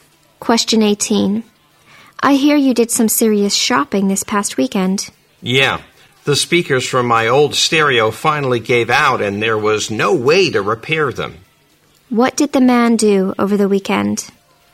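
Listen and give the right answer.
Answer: He bought new speakers for his stereo.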